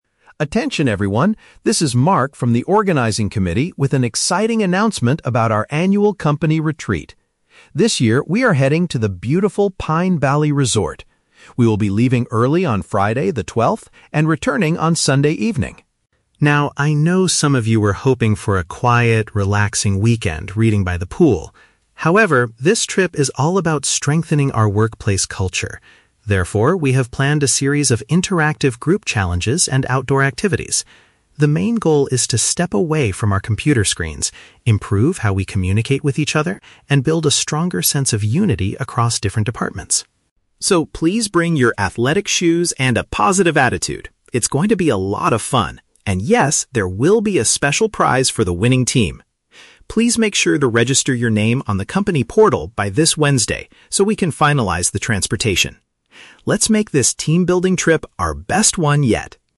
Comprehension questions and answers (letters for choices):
Listen to the announcement about a company trip and choose the correct answer (A, B, or C).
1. What is the primary purpose of the upcoming trip?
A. To provide employees with a peaceful weekend to rest by the pool.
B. To enhance cooperation and communication among staff members.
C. To celebrate the company's financial success over the past year.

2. What are the employees expected to do during the getaway?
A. Participate in physical group tasks and competitions.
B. Finish their computer work away from the office environment.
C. Attend several long meetings about future department goals.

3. What must the staff members do before Wednesday?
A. Purchase new athletic shoes for the outdoor activities.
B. Form a team and choose a team leader for the games.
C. Sign up for the event online to secure their travel arrangements.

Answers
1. B
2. A
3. C

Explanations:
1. Mark states that the trip is about "strengthening our workplace culture," improving "how we communicate," and building "a stronger sense of unity." Option B paraphrases these ideas perfectly as enhancing "cooperation and communication." Why the trap is wrong: Option (A) is a trap. Mark explicitly mentions that some people were "hoping for a quiet, relaxing weekend... by the pool," but he rejects this idea by saying "However, this trip is all about..." Option (C) is a plausible reason for a corporate trip but is never mentioned.
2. The organizer mentions "interactive group challenges and outdoor activities" and notes there is a prize for the "winning team." Option A captures this using synonyms ("physical group tasks and competitions"). Why the trap is wrong: Option (B) is a trap. The audio mentions "computer screens," but the actual goal is to "step away" from them, not finish work on them. Option (C) is a typical corporate retreat activity, making it a plausible distractor, but it is not stated in the audio.
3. Mark asks everyone to "register your name on the company portal" so they can "finalize the transportation." Option C perfectly paraphrases this as signing up "online" to secure "travel arrangements." Why the trap is wrong: Option (A) is a trap. Mark reminds them to "bring your athletic shoes," but he doesn't say they need to purchase new ones before Wednesday. Option (B) is a logical step for a competition, but it is not the action required by Wednesday.

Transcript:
Mark: Attention everyone, this is Mark from the organizing committee with an exciting announcement about our annual company retreat. This year, we are heading to the beautiful Pine Valley Resort. We will be leaving early on Friday, the 12th, and returning on Sunday evening.
Now, I know some of you were hoping for a quiet, relaxing weekend reading by the pool. However, this trip is all about strengthening our workplace culture. Therefore, we have planned a series of interactive group challenges and outdoor activities. The main goal is to step away from our computer screens, improve how we communicate with each other, and build a stronger sense of unity across different departments.
So, please bring your athletic shoes and a positive attitude! It's going to be a lot of fun, and yes, there will be a special prize for the winning team. Please make sure to register your name on the company portal by this Wednesday so we can finalize the transportation. Let's make this team-building trip our best one yet!